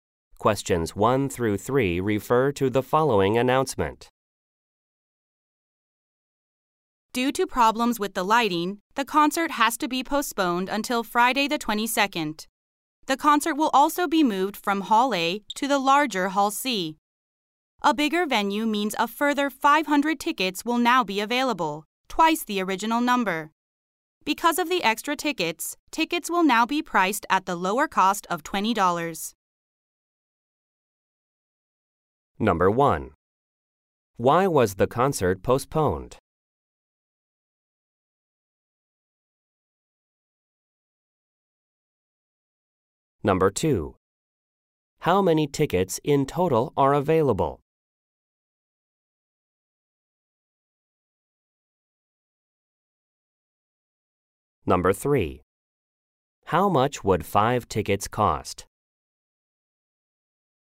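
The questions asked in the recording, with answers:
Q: Why was the concert postponed?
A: Problems with the lighting

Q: How many tickets in total are available?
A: 1,000

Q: How much would 5 tickets cost?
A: $100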